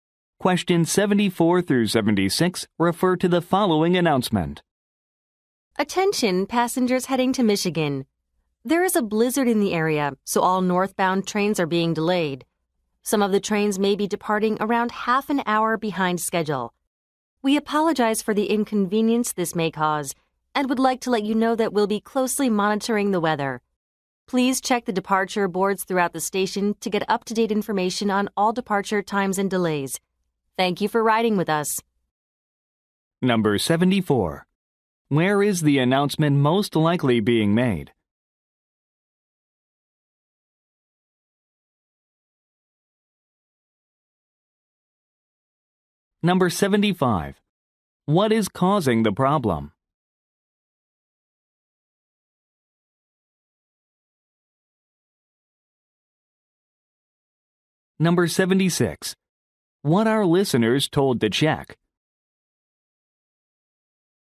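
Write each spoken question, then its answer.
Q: Where is the announcement most likely being made?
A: At a train station

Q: What is causing the problem?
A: A blizzard

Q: What are listeners told to check?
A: The departure boards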